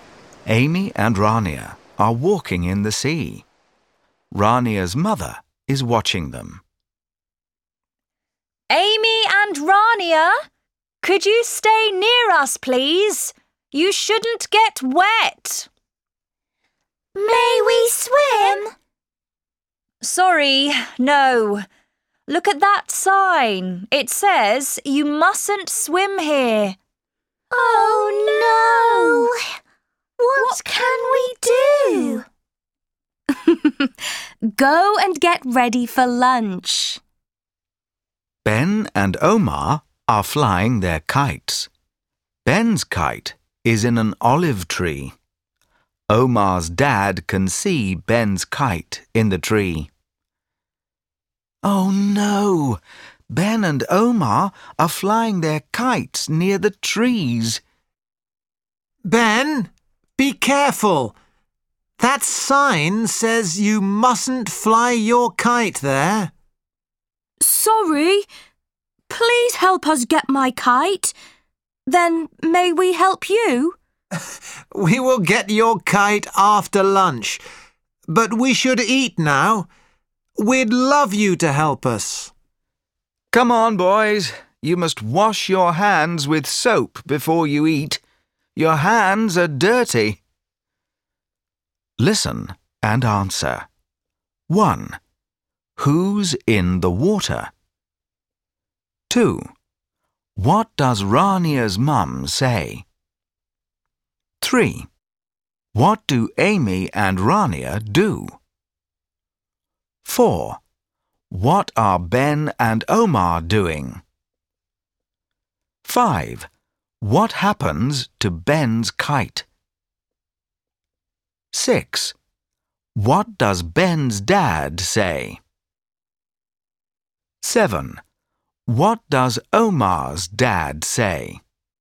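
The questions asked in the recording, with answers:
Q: Who's in the water?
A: Amy and Rania

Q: What does Rania's mum say?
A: Stay near us; you shouldn't get wet and you mustn't swim here.

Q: What do Amy and Rania do?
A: They go and get ready for lunch.

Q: What are Ben and Omar doing?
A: Flying their kites

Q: What happens to Ben's kite?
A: It gets stuck in an olive tree.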